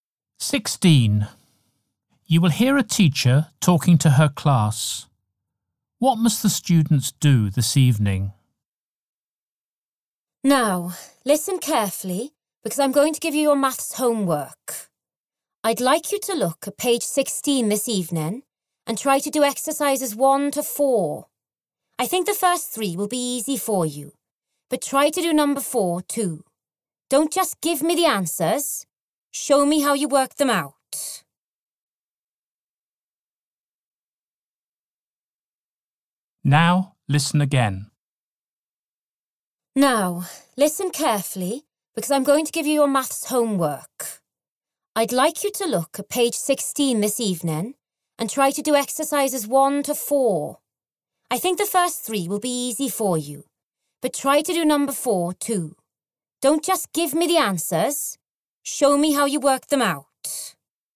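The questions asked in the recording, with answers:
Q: What must the students do this evening?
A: Maths homework: exercises 1 to 4 on page 16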